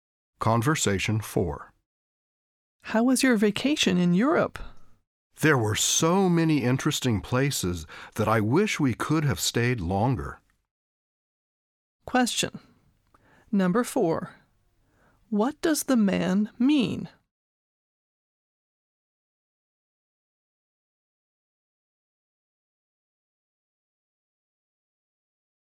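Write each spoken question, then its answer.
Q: What does the man mean?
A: He enjoyed the trip and wished he could have stayed longer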